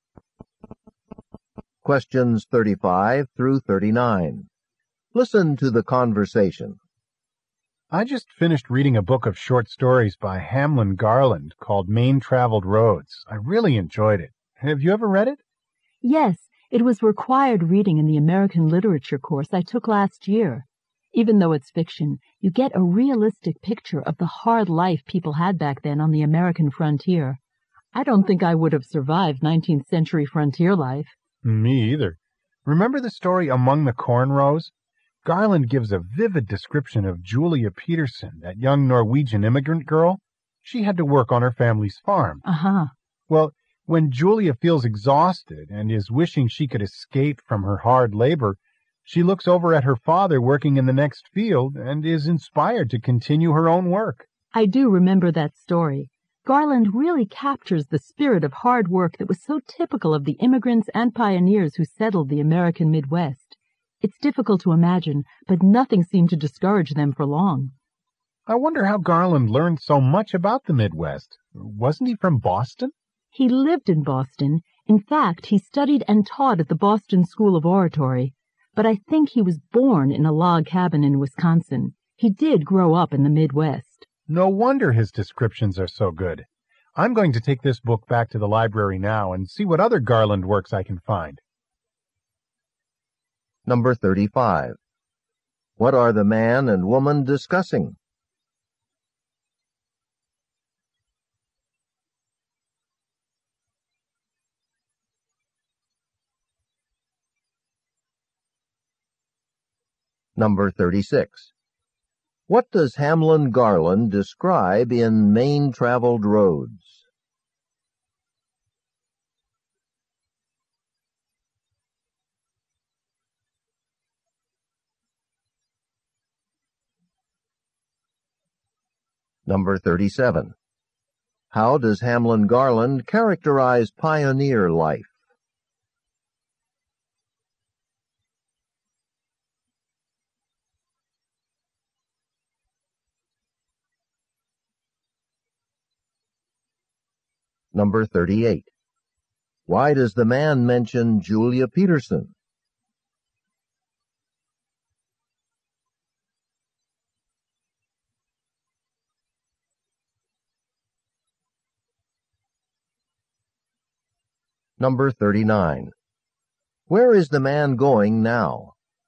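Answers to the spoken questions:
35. A book of short stories by Hamlin Garland
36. The hard life on the American frontier
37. As hard work that did not discourage people for long
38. To give an example of the pioneers' spirit of hard work
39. To the library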